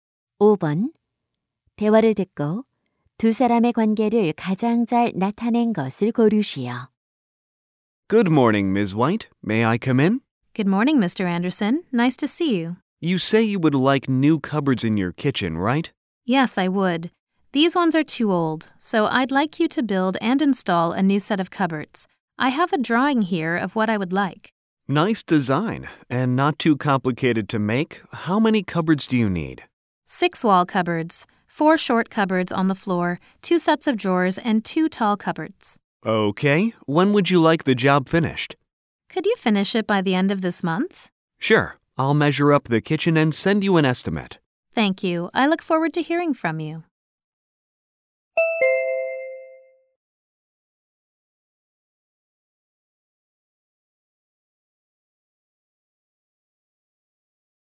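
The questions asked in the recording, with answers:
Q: 대화를 듣고 두 사람의 관계를 가장 잘 나타낸 것을 고르시오.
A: 집주인 - 가구(찬장) 제작자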